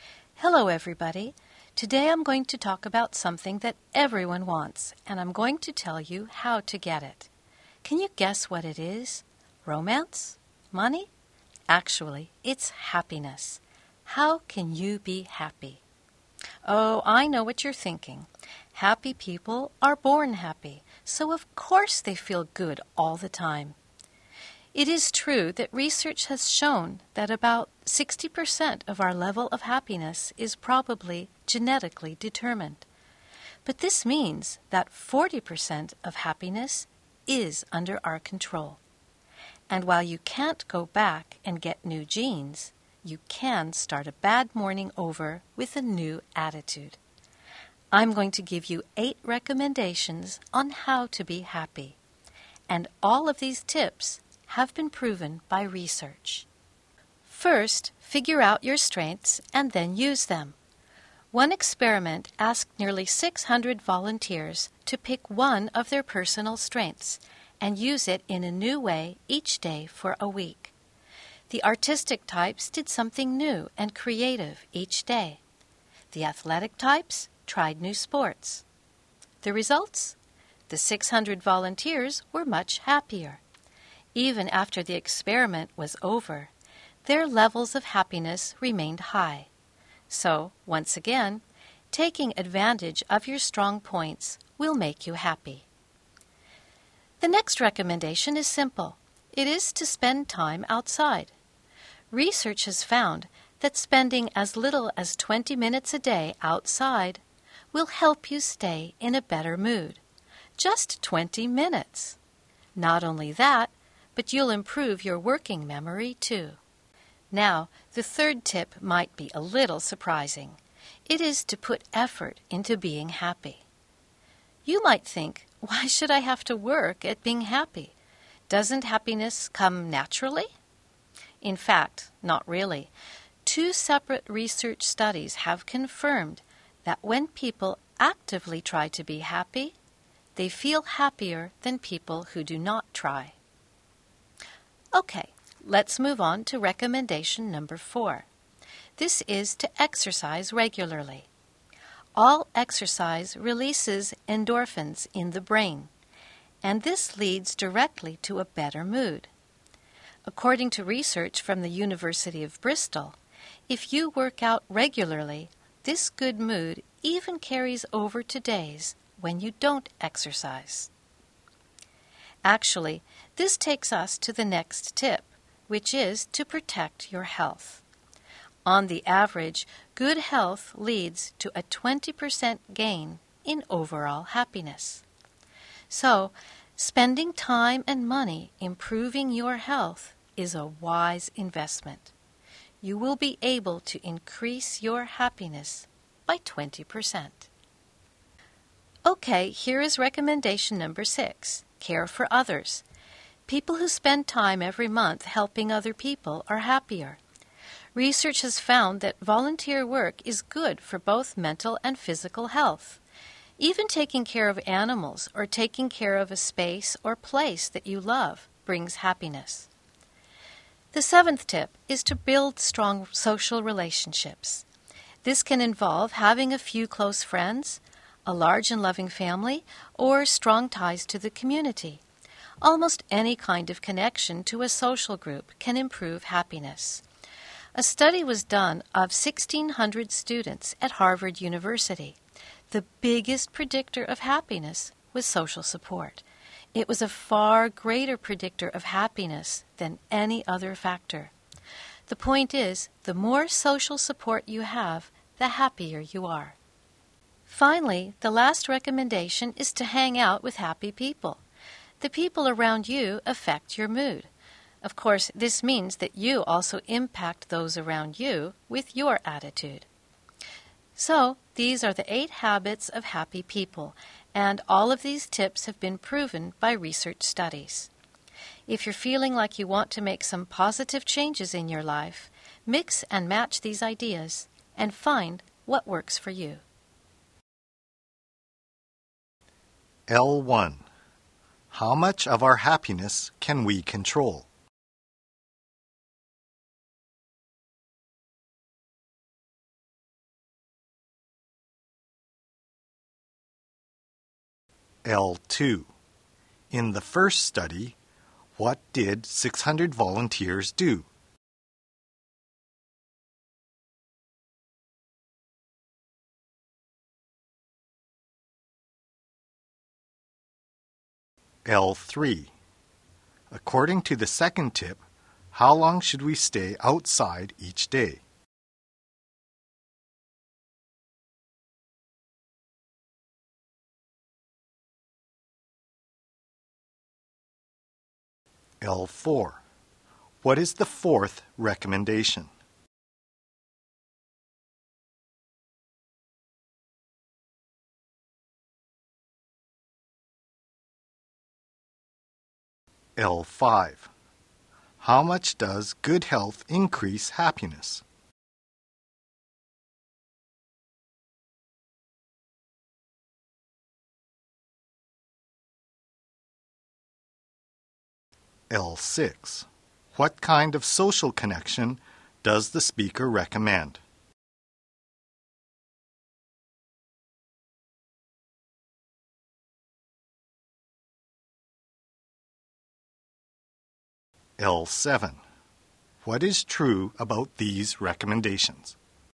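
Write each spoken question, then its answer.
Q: How much of our happiness can we control?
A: About 40%

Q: In the first study, what did 600 volunteers do?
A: Each picked one of their personal strengths and used it in a new way every day for a week

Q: According to the second tip, how long should we stay outside each day?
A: At least 20 minutes

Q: What is the fourth recommendation?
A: Exercise regularly

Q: How much does good health increase happiness?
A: By about 20%

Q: What kind of social connection does the speaker recommend?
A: Strong social relationships, such as close friends, a loving family or community ties

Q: What is true about these recommendations?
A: Research studies have proven all of them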